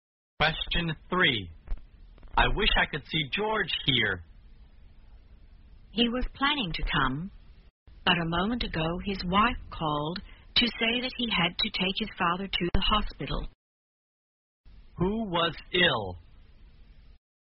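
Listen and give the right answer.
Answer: George's father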